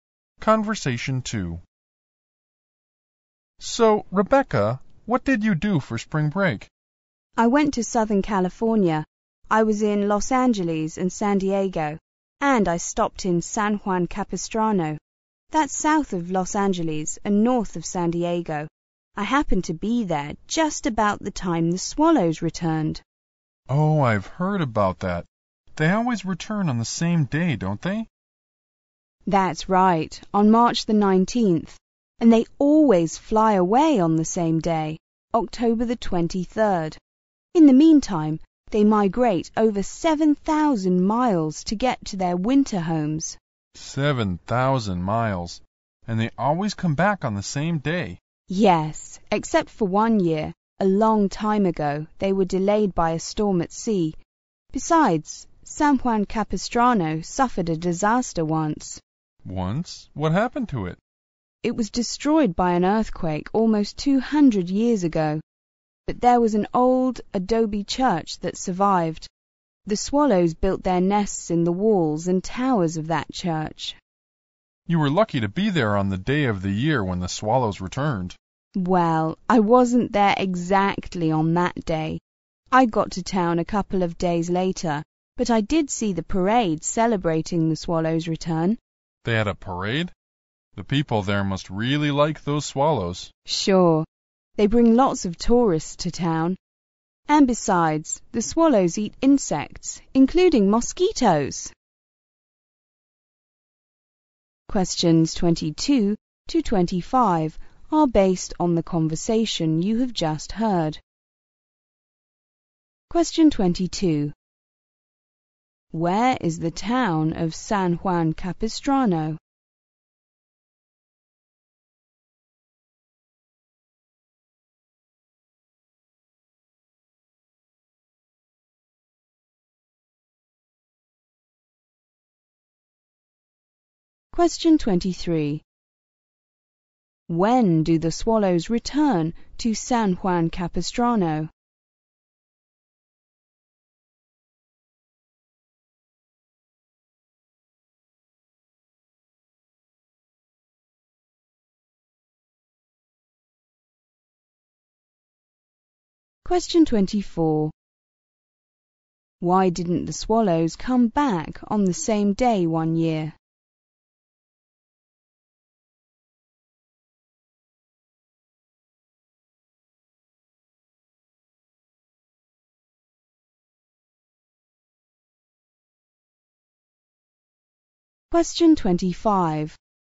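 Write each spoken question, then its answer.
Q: Where is the town of San Juan Capistrano?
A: South of Los Angeles and north of San Diego

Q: When do the swallows return to San Juan Capistrano?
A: On March 19th

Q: Why didn't the swallows come back on the same day one year?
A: They were delayed by a storm at sea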